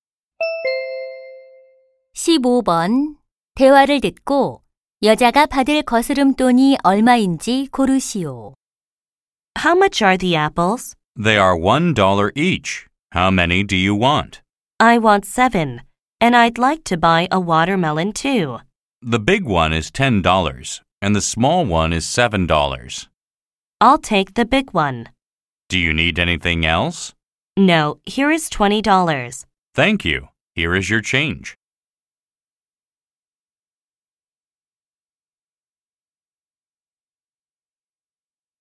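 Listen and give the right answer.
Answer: 3달러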